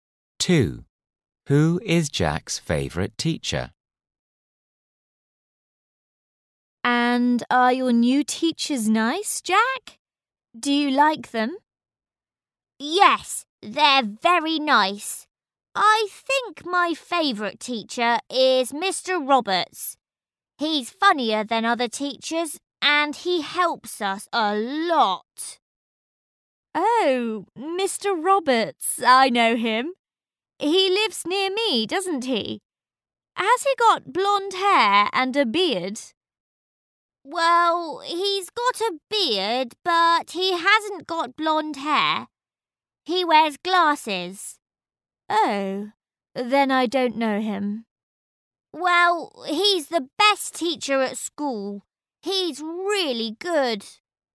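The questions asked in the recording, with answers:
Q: Who is Jack's favourite teacher?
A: Mr. Roberts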